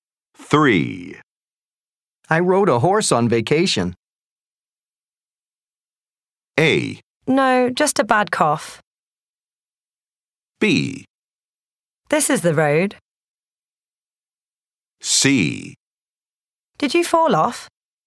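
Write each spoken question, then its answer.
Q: I rode a horse on vacation.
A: C: Did you fall off?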